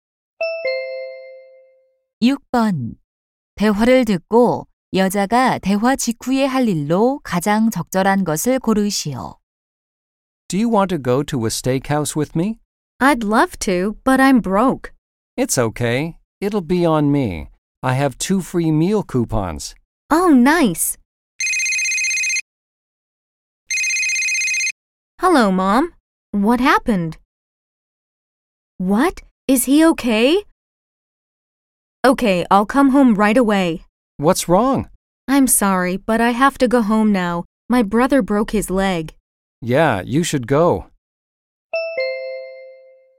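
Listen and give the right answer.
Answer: 집에 가기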